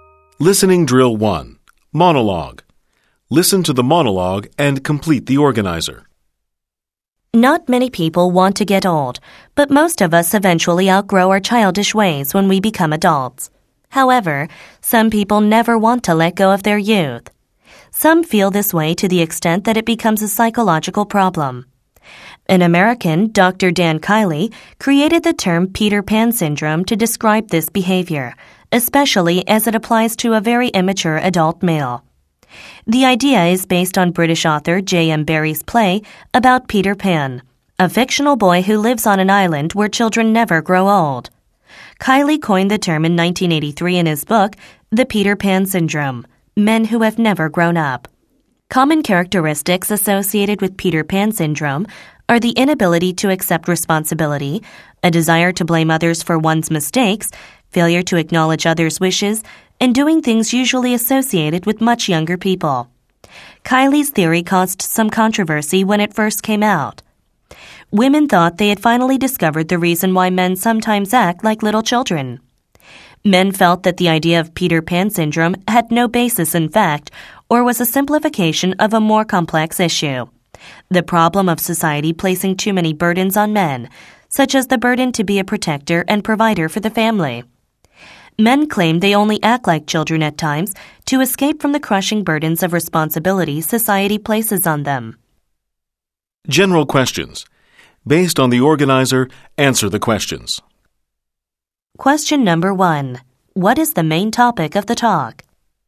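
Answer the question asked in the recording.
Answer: Peter Pan syndrome: adults, especially men, who never grow up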